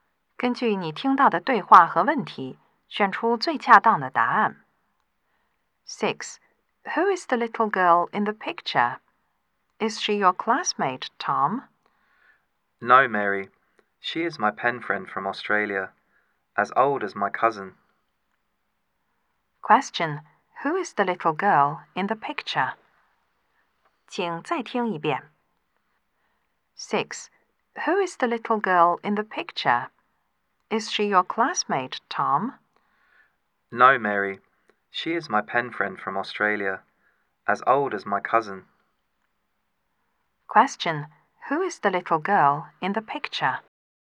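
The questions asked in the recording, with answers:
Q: Who is the little girl in the picture?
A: Tom's pen friend from Australia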